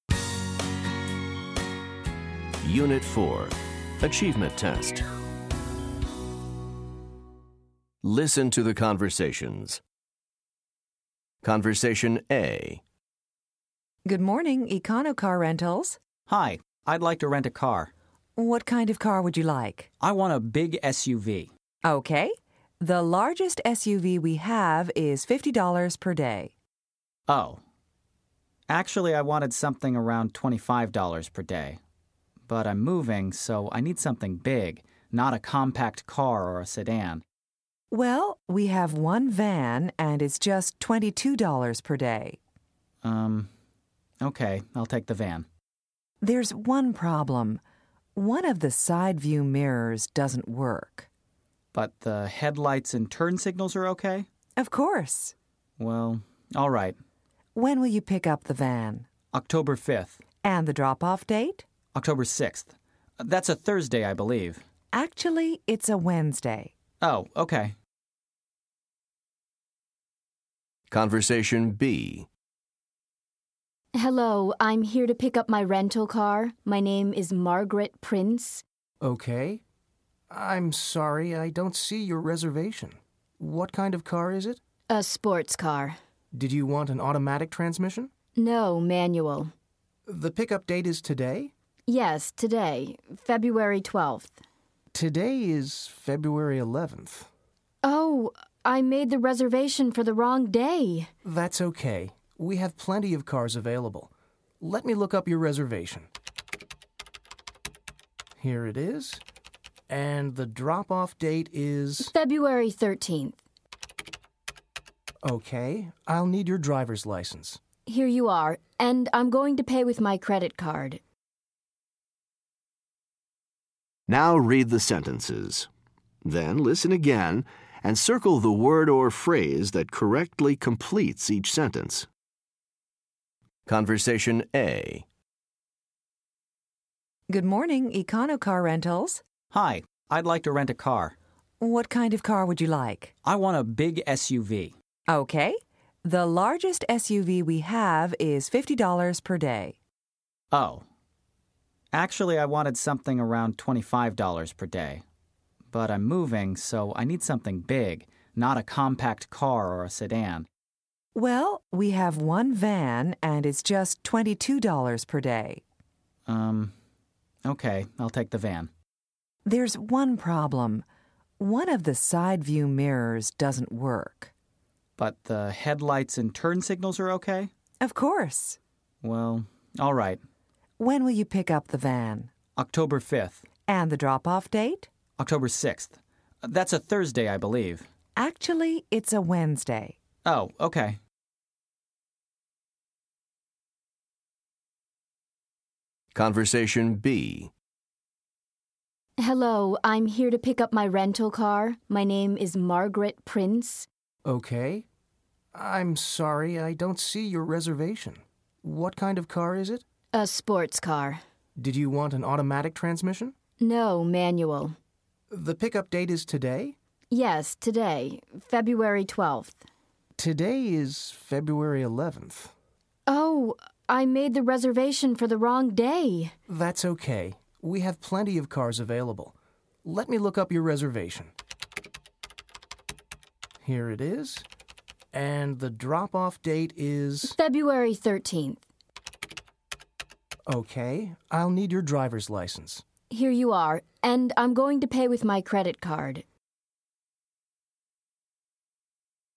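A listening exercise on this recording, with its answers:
Listen to the conversations. Then choose the word or phrase that correctly completes each sentence.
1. The driver decides to rent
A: a van

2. One of the van's ............. doesn't work.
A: side view mirrors

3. October 5th is ......................... .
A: the pick-up date

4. The woman reserved a ...................... .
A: sports car

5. The man has trouble finding ............................ .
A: the reservation

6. The drop-off date is .......................... .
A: February 13th

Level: Top Notch 2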